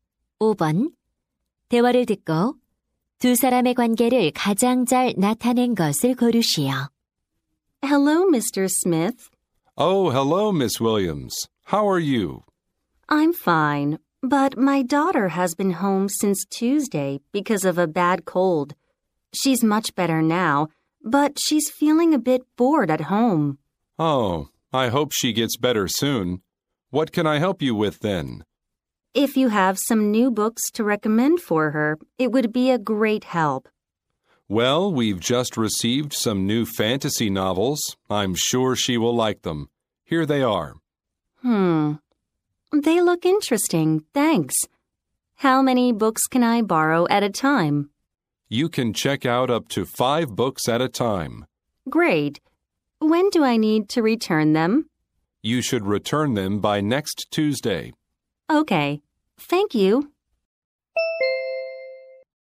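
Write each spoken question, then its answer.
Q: 대화를 듣고 두 사람의 관계를 가장 잘 나타낸 것을 고르시오.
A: 도서관 사서 - 학부모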